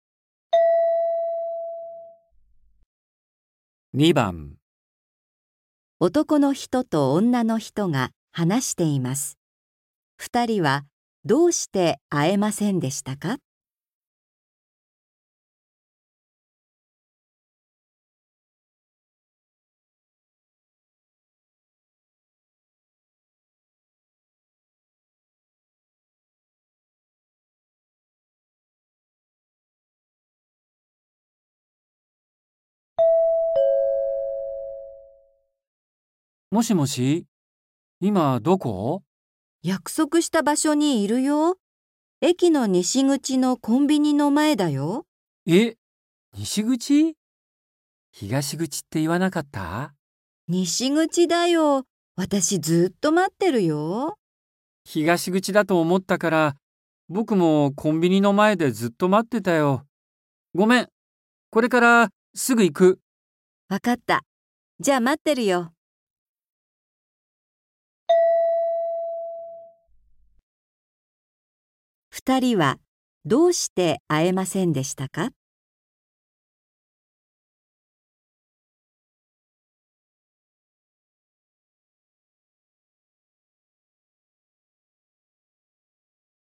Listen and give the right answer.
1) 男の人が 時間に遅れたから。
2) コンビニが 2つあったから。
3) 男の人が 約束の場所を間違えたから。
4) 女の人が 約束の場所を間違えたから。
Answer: 3) 男の人が 約束の場所を間違えたから。

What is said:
M:もしもし、今どこ?
F:約束した場所にいるよ。駅の西口のコンビニの前だよ。
M:え、西口?東口って言わなかった?
F:西口だよ。私、ずーっと待ってるよ。
M:東口だと思ったから、僕もコンビニの前でずっと待ってたよ。ごめん、それからすぐ行く。
二人は、どうして会えませんでしたか。

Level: 初級